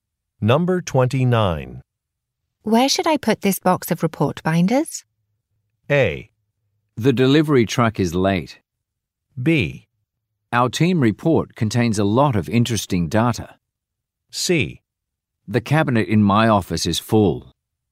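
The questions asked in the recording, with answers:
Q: Where should I put this box of report binders?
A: C: The cabinet in my office is full.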